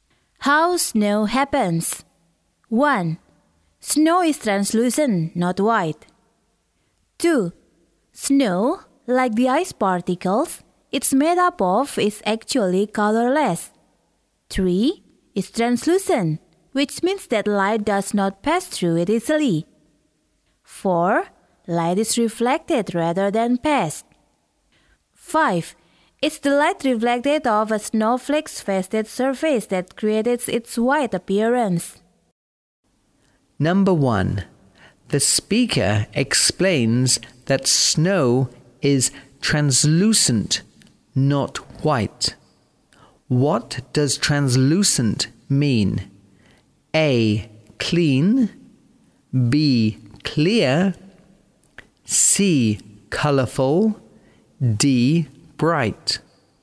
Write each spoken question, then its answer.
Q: The speaker explains that snow is translucent, not white. What does translucent mean?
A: B. Clear.